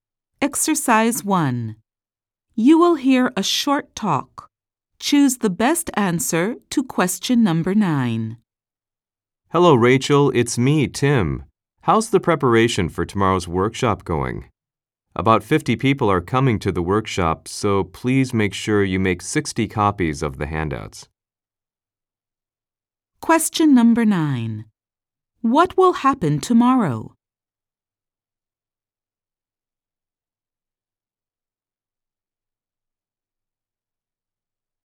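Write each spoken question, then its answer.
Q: What will happen tomorrow?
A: A workshop will be held.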